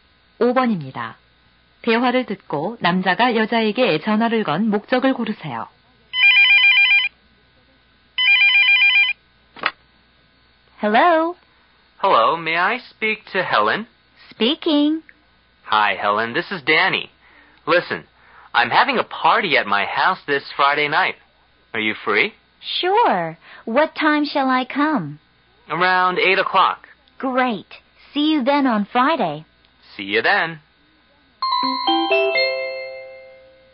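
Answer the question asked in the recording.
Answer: 파티에 초대하려고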